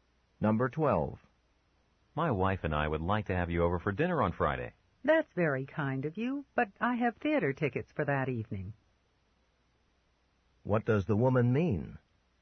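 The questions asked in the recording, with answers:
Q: What does the woman mean?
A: She can't come to dinner because she has theater tickets that evening.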